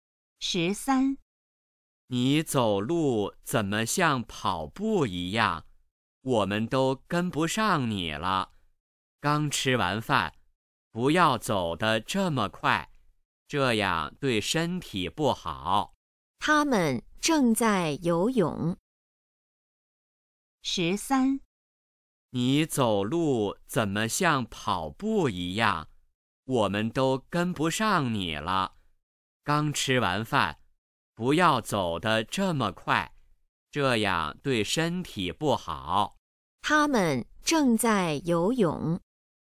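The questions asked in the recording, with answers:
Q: 他们正在游泳。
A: 错(他们在走路)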